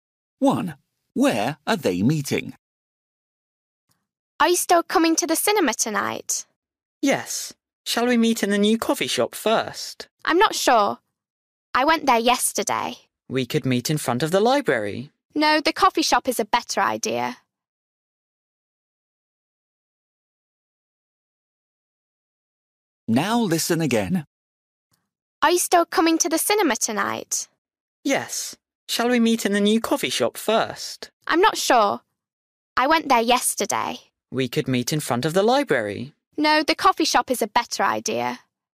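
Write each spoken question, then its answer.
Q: Where are they meeting?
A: In the new coffee shop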